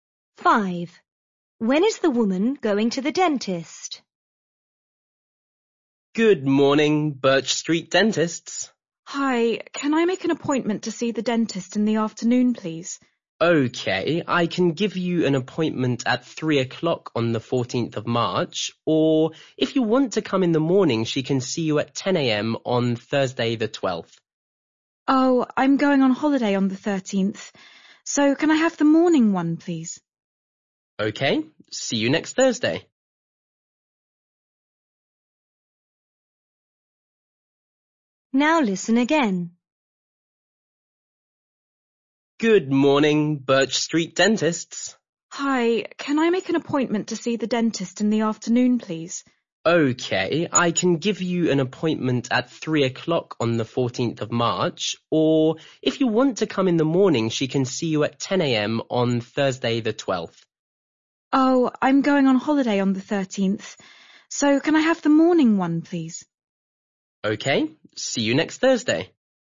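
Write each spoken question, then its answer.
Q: When is the woman going to the dentist?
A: At 10 a.m. on Thursday the 12th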